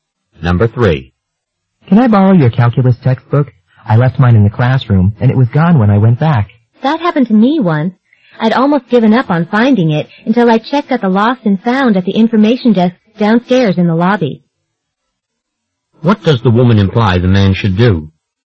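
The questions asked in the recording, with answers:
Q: What does the woman imply the man should do?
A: Check the lost and found at the information desk.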